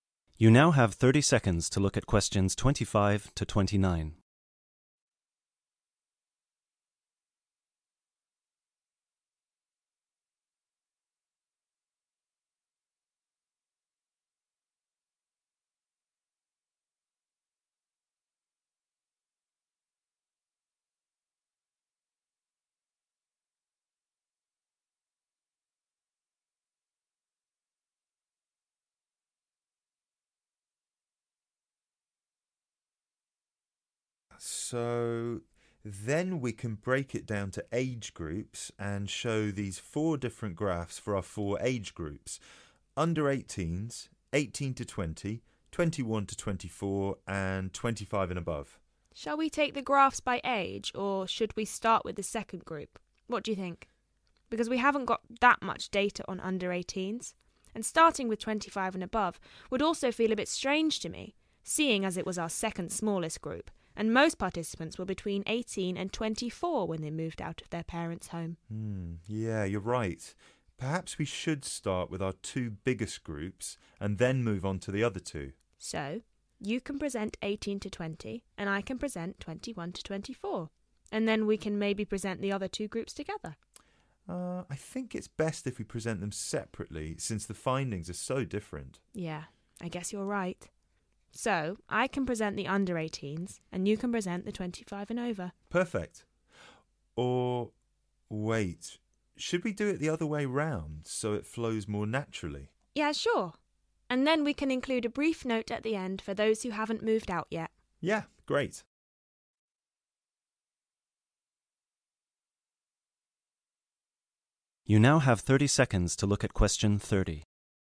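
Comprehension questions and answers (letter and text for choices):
Which student will present which information?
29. the group that still live with parents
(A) Melanie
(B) Chris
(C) Both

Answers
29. (C) Both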